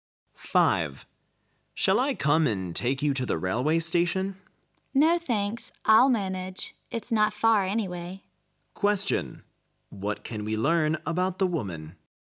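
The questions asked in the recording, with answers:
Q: What can we learn about the woman?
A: She will get to the station by herself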